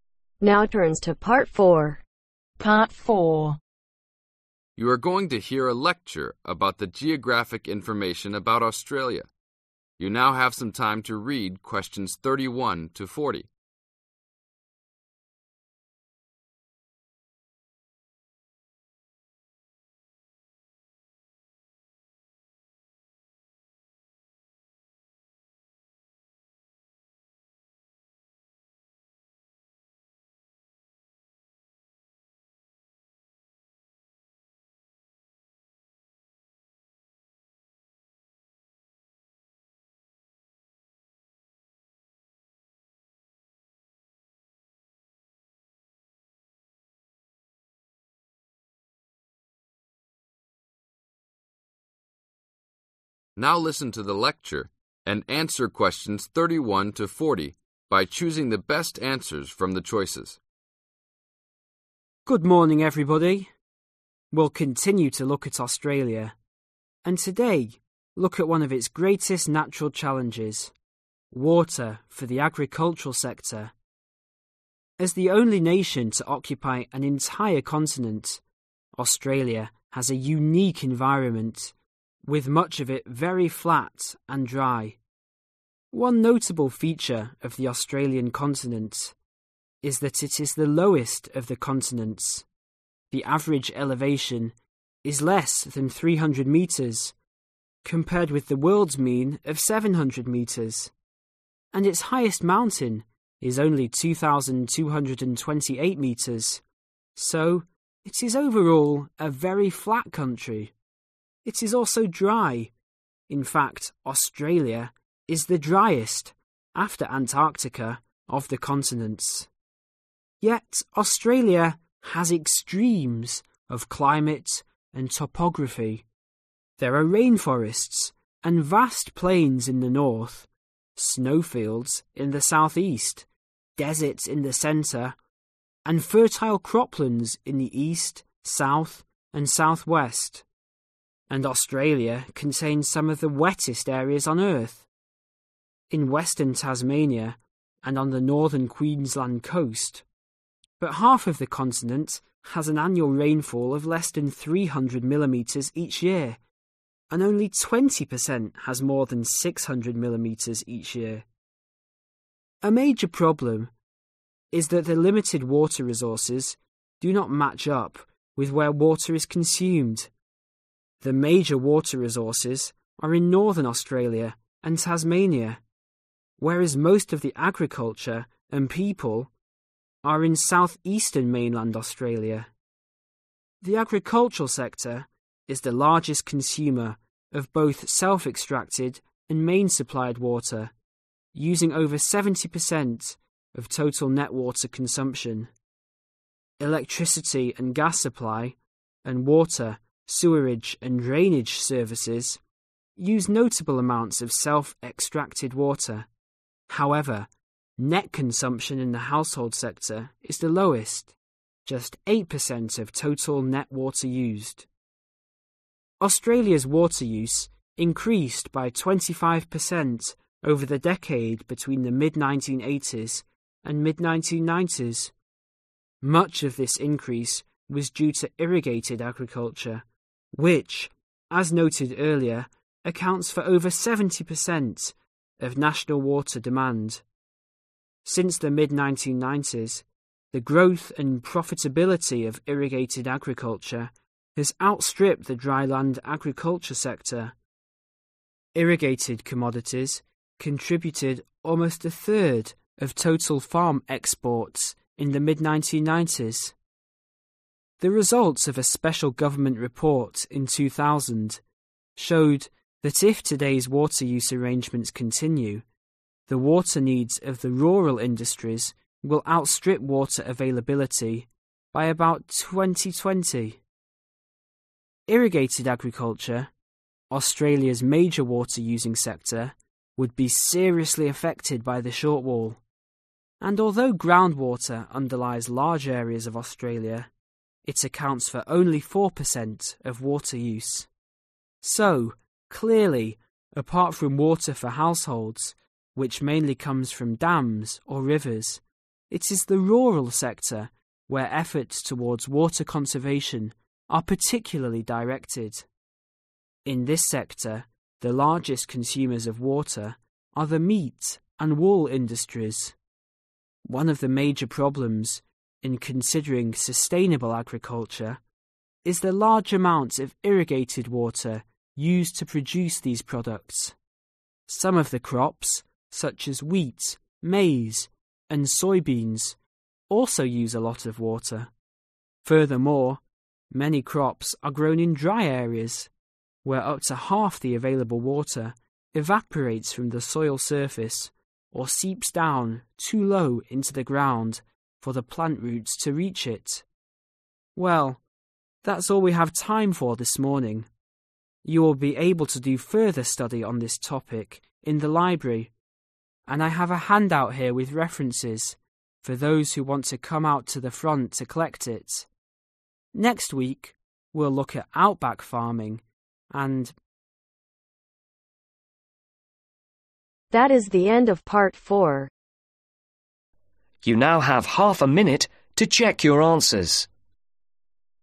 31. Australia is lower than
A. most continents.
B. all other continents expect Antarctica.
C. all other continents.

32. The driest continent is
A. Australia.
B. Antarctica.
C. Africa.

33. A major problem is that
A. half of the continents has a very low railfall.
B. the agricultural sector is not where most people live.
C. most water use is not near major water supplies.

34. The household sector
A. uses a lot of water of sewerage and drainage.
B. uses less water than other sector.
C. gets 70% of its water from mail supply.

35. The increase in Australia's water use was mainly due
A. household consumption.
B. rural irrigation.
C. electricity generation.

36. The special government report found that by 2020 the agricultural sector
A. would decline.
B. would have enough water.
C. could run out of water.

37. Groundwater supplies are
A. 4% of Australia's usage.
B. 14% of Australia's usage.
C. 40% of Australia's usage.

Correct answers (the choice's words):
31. all other continents.
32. Antarctica.
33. most water use is not near major water supplies.
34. uses less water than other sector.
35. rural irrigation.
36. could run out of water.
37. 4% of Australia's usage.